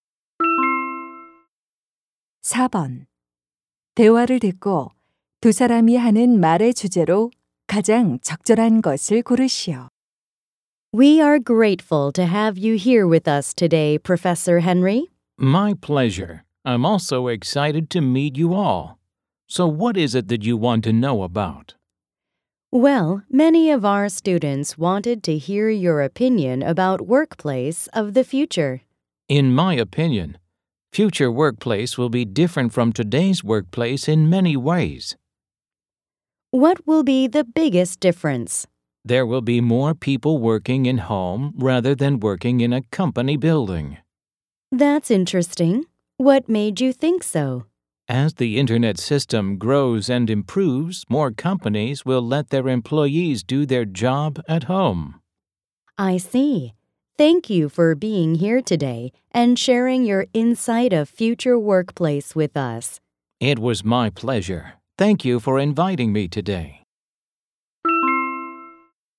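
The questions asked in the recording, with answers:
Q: 대화를 듣고 두 사람이 하는 말의 주제로 가장 적절한 것을 고르시오.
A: 미래의 직장(재택근무 증가)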